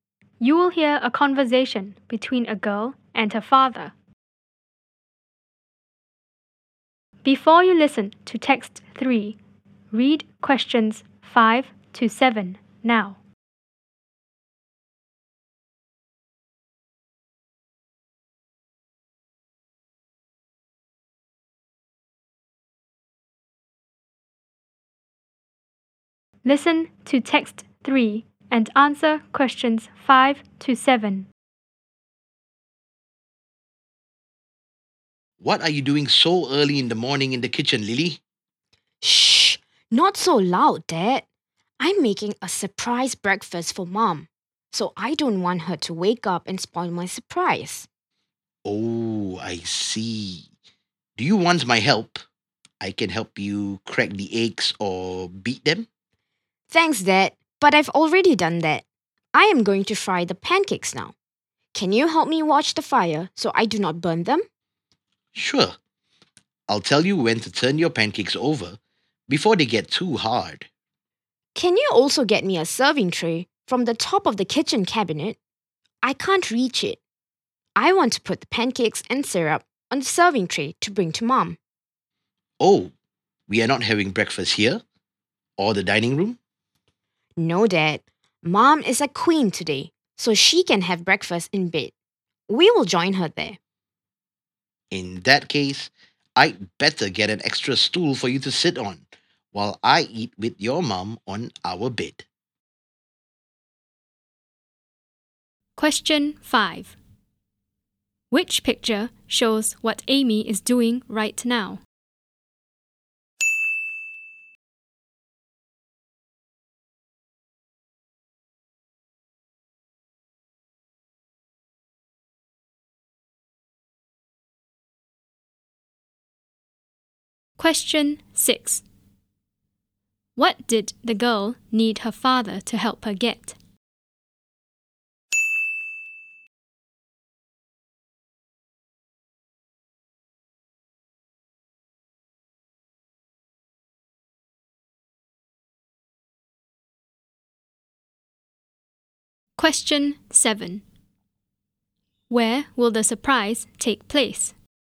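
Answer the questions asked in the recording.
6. A serving tray
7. In Mom's bed (the bedroom)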